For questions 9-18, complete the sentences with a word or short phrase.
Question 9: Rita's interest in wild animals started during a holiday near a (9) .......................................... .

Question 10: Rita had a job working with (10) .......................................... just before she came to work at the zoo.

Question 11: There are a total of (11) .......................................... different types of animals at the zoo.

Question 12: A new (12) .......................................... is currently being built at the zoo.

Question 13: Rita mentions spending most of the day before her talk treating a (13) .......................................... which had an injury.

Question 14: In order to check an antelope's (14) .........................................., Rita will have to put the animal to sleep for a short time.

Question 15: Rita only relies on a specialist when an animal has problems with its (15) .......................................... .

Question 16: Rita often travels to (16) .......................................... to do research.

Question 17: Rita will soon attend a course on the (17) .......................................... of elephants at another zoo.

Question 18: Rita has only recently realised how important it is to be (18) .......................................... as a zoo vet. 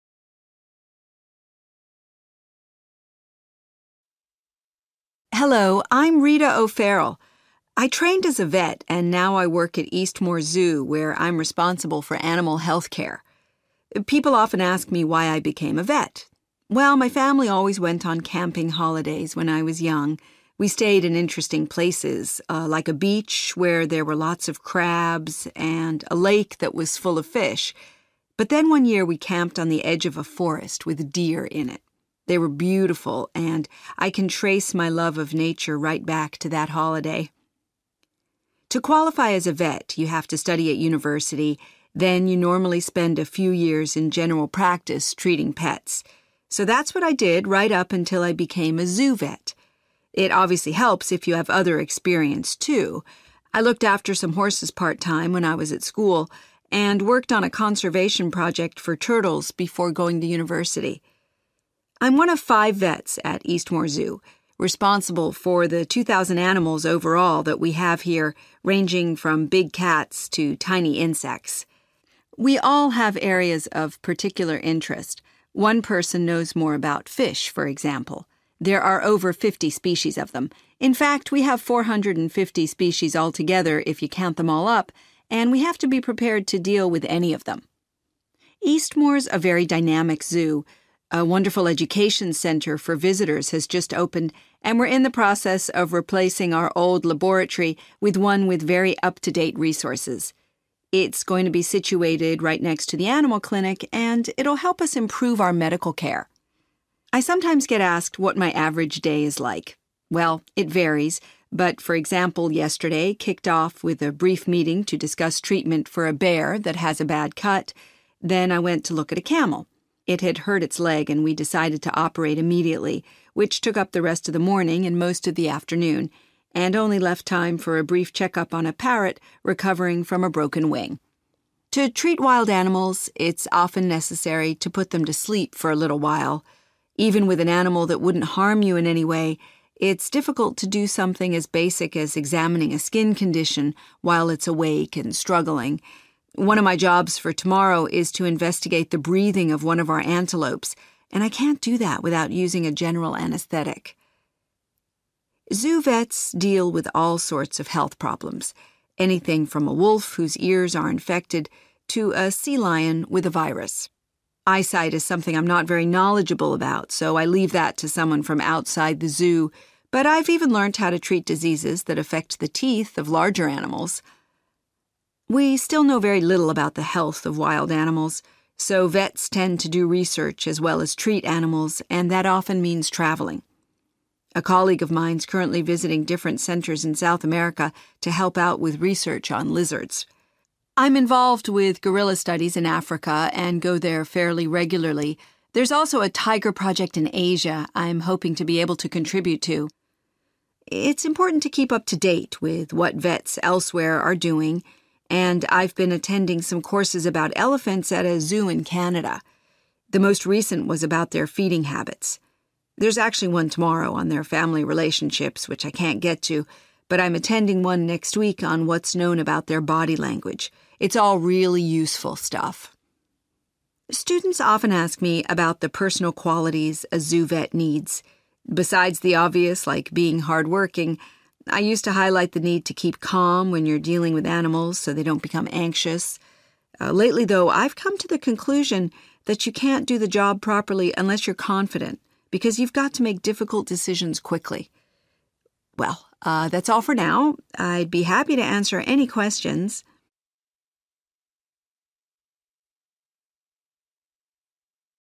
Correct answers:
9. forest
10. pets
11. 450
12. laboratory/lab
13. camel
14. breathing
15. eyesight/eyes
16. Africa
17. body language
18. confident

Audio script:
Rita: Hello, I'm Rita O'Farrell. I trained as a vet and now I work at Eastmore Zoo, where I'm responsible for animal health care.
People often ask me why I became a vet. Well, my family always went on camping holidays when I was young. We stayed in interesting places like a beach where there were lots of crabs and a lake that was full of fish. But then one year we camped on the edge of a forest with deer in it. They were beautiful, and I can trace my love of nature right back to that holiday.
To qualify as a vet, you have to study at university, then you normally spend a few years in general practice, treating pets. So that's what I did, right up until I became a zoo vet. It obviously helps if you have other experience too. I looked after some horses part time when I was at school, and worked on a conservation project for turtles before going to university.
I'm one of five vets at Eastmore Zoo responsible for the two thousand animals overall that we have here ranging from big cats to tiny insects. We all have areas of particular interest – one person knows more about fish, for example; there are over fifty species of them. In fact, we have four hundred and fifty species altogether if you count them all up, and we have to be prepared to deal with any of them.
Eastmore's a very dynamic zoo. A wonderful education centre for visitors has just opened and we're in the process of replacing our old laboratory with one with very up-to-date resources. It's going to be situated right next to the animal clinic and it'll help us improve our medical care.
I sometimes get asked what my average day is like. Well, it varies, but, for example, yesterday kicked off with a brief meeting to discuss treatment for a bear that has a bad cut. Then I went to look at a camel. It had hurt its leg, and we decided to operate immediately, which took up the rest of the morning and most of the afternoon, and only left time for a brief check-up on a parrot recovering from a broken wing.
To treat wild animals, it's often necessary to put them to sleep for a little while. Even with an animal that wouldn't harm you in any way, it's difficult to do something as basic as examining a skin condition while it's awake and struggling. One of my jobs for tomorrow is to investigate the breathing of one of our antelopes and I can't do that without using a general anaesthetic.
Zoo vets deal with all sorts of health problems – anything from a wolf whose ears are infected to a sea lion with a virus. Eyesight is something I'm not very knowledgeable about, so I leave that to someone from outside the zoo, but I've even learnt how to treat diseases that affect the teeth of larger animals.
We still know very little about the health of wild animals, so vets tend to do research as well as treat animals, and that often means travelling. A colleague of mine's currently visiting different centres in South America to help out with research on lizards. I'm involved with gorilla studies in Africa and go there fairly regularly. There's also a tiger project in Asia I'm hoping to be able to contribute to.
It's important to keep up to date with what vets elsewhere are doing and I've been attending some courses about elephants at a zoo in Canada. The most recent was about their feeding habits. There's actually one tomorrow on their family relationships, which I can't get to, but I'm attending one next week on what's known about their body language. It's all really useful stuff.
Students often ask me about the personal qualities a zoo vet needs. Besides the obvious, like being hard-working, I used to highlight the need to keep calm when you're dealing with animals so they don't become anxious. Lately, though, I've come to the conclusion that you can't do the job properly unless you're confident – because you've got to make difficult decisions quickly.
Well, that's all for now. I'd be happy to answer any questions.